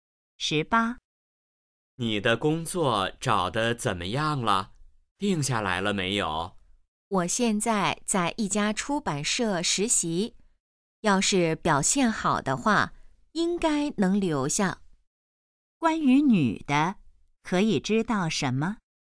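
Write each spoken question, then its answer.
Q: 关于女的,可以知道什么?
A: 她在一家出版社实习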